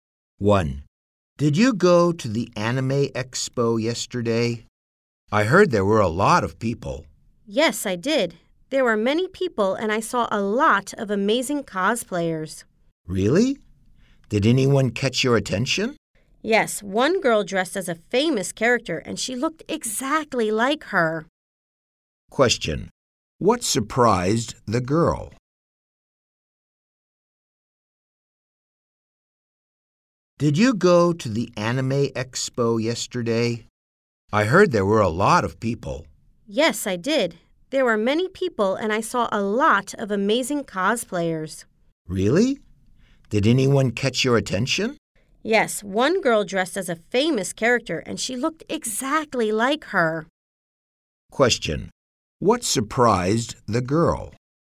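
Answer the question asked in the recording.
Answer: A girl cosplayer looked exactly like a famous character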